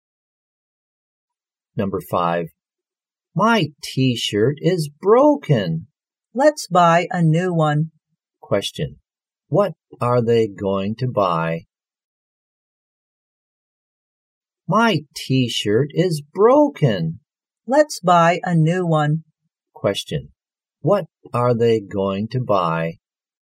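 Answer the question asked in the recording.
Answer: A new T-shirt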